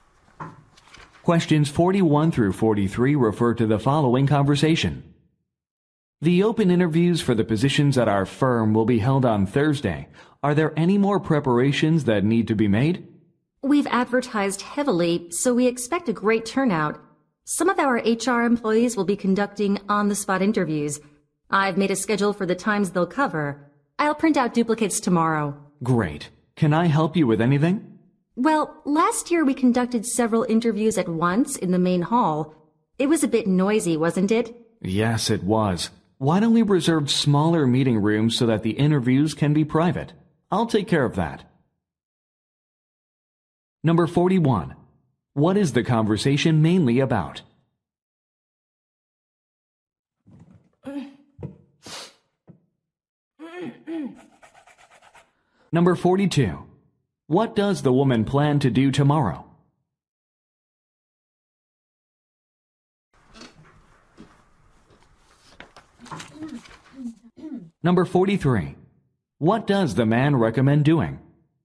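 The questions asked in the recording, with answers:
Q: What is the conversation mainly about?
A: Preparing for open job interviews

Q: What does the woman plan to do tomorrow?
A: Print copies of the interview schedule

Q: What does the man recommend doing?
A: Reserving smaller meeting rooms for private interviews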